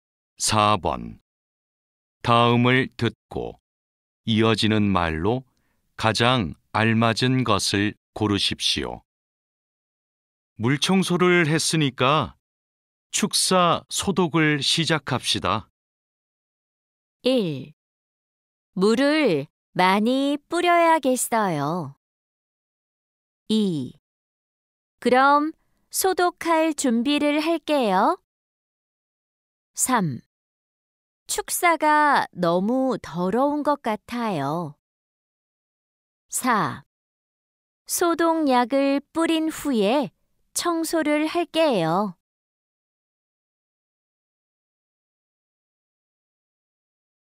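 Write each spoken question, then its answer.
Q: 물청소를 했으니까 축사 소독을 시작합시다.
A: 2: 그럼 소독할 준비를 할게요.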